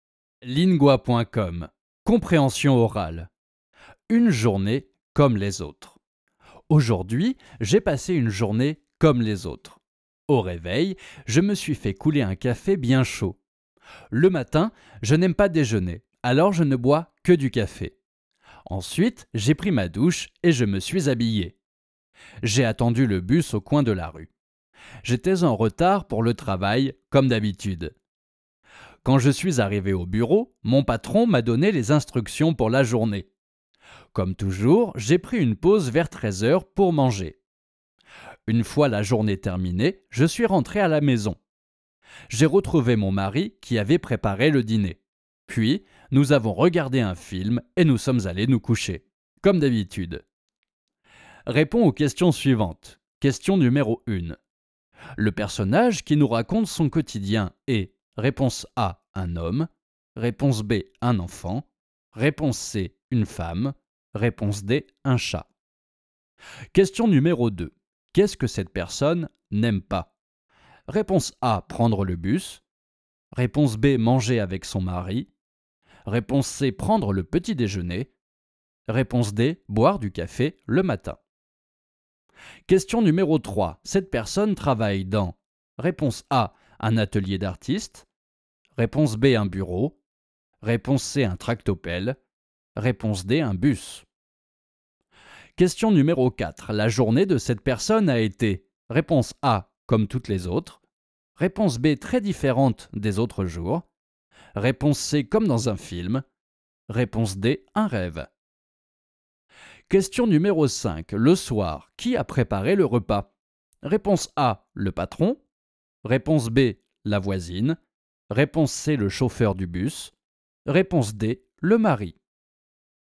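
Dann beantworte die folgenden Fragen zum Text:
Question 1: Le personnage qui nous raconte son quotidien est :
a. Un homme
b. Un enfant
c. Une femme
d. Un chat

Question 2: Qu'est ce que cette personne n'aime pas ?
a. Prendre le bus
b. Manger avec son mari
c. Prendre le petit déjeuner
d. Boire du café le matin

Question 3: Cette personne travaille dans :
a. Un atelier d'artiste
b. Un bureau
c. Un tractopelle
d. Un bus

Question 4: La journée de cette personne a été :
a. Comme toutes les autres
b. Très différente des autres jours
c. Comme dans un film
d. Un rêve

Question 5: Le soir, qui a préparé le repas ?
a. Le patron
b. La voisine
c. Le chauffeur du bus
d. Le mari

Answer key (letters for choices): 1a, 2c, 3b, 4a, 5d

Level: Basis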